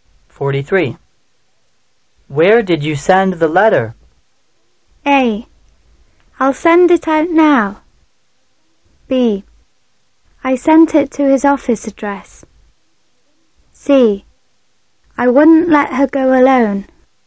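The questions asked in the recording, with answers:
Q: Where did you send the letter?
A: B: I sent it to his office address.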